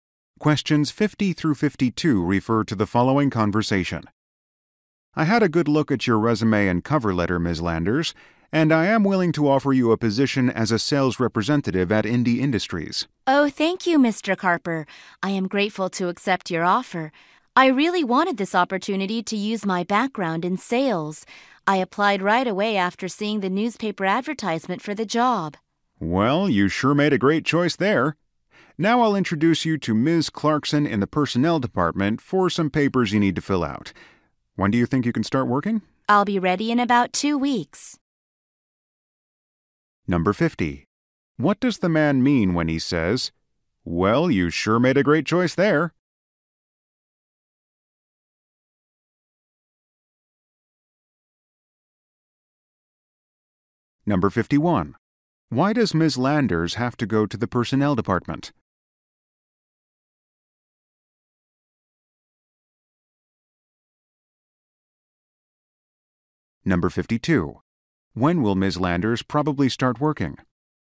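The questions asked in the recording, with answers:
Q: Why does Ms. Landers have to go to the personnel department?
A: To fill out some papers

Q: When will Ms. Landers probably start working?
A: In about 2 weeks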